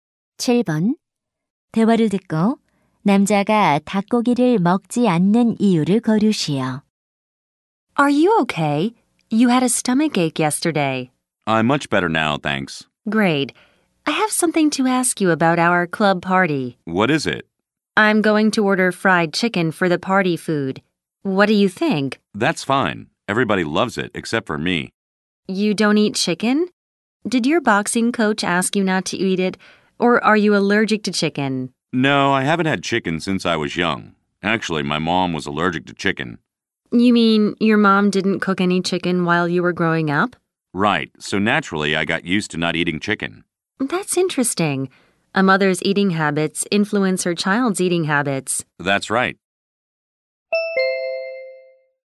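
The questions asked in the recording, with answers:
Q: 대화를 듣고 남자가 닭고기를 먹지 않는 이유를 거르시오.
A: 어머니가 닭고기 알레르기가 있어 어릴 때부터 먹지 않는 습관이 들어서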